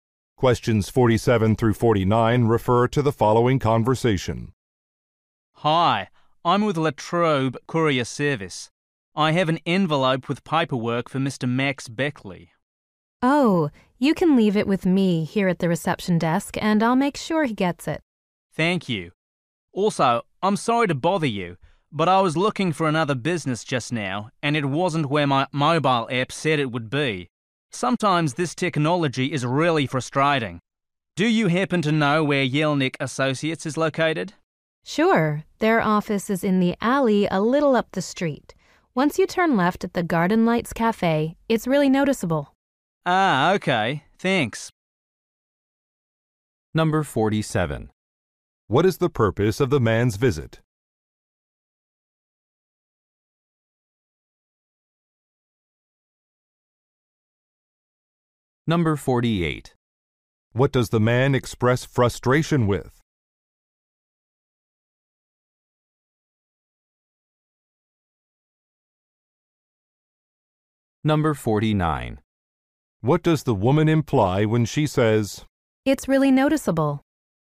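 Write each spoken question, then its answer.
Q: What is the purpose of the man's visit?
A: To deliver an envelope of paperwork

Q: What does the man express frustration with?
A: A mobile app

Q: What does the woman imply when she says,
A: The office is easy to find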